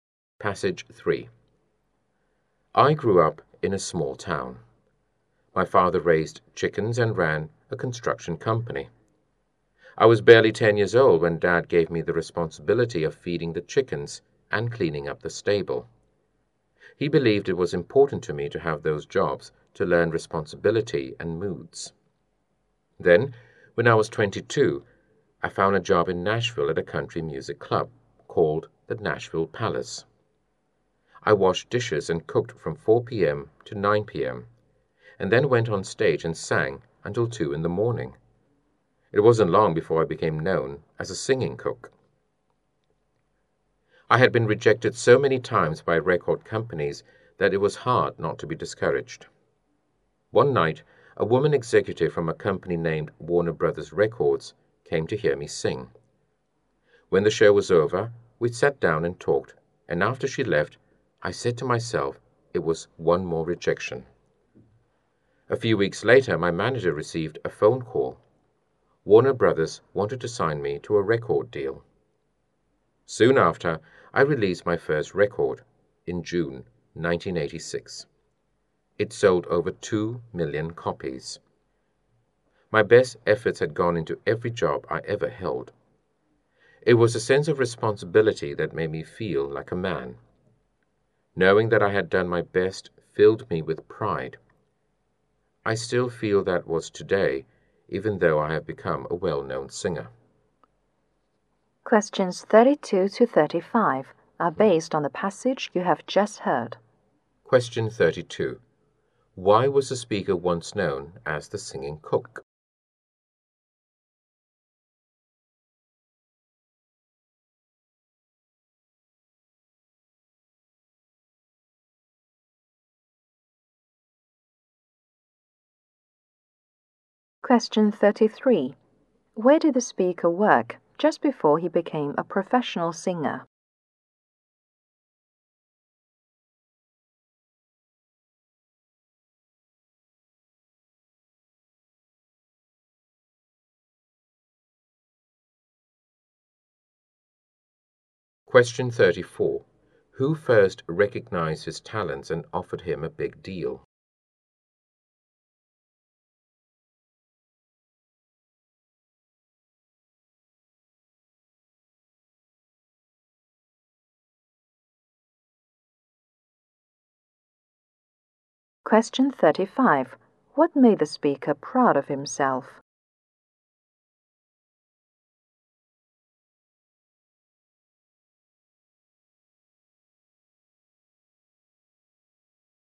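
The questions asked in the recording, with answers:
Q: Why was the speaker once known as the singing cook?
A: He cooked and washed dishes at a club and then sang on stage

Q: Where did the speaker work just before he became a professional singer?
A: At the Nashville Palace, a country music club

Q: Who first recognized his talents and offered him a big deal?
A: A woman executive from Warner Brothers Records

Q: What made the speaker proud of himself?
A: Knowing he had done his best in every job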